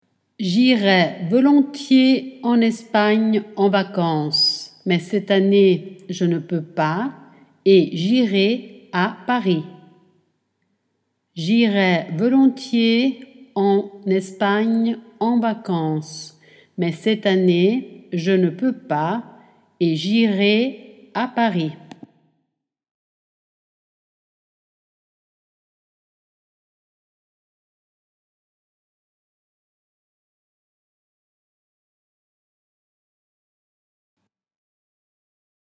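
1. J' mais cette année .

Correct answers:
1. irai volontiers en Espagne en vacances, / je ne peux pas et j'irai à Paris

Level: A2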